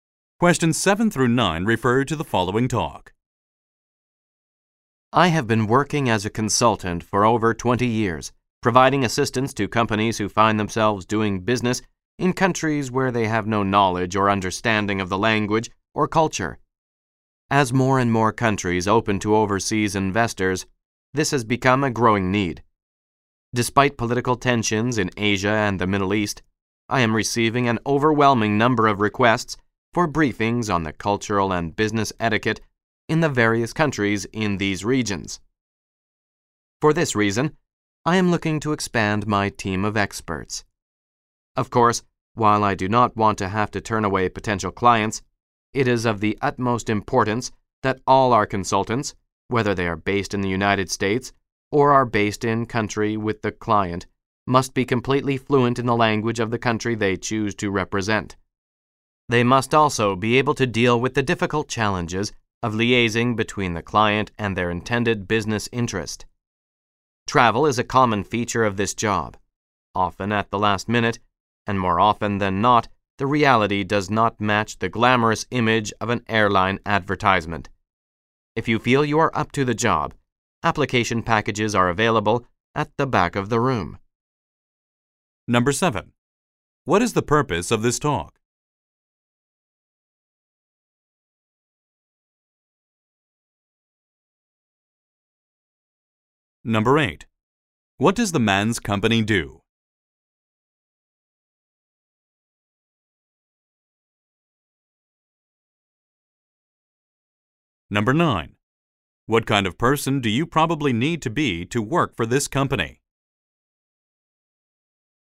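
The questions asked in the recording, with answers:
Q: What is the purpose of this talk?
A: To recruit new consultants.

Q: What does the man's company do?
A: It advises companies on the language, culture and business etiquette of foreign countries.

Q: What kind of person do you probably need to be to work for this company?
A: Fully fluent in a foreign language and able to travel at short notice.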